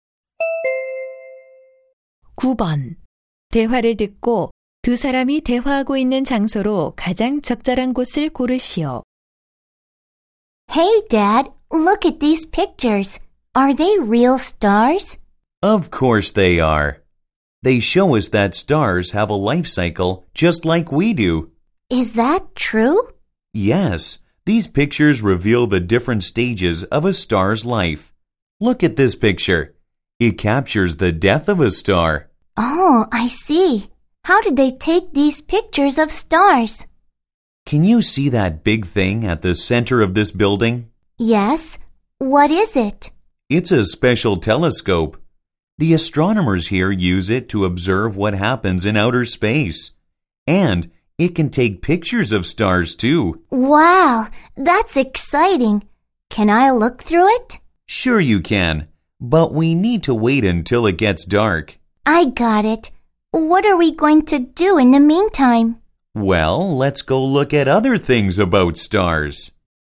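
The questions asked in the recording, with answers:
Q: 대화를 듣고 두 사람이 대화하고 있는 장소로 가장 적절한 곳을 고르시오.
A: 천문대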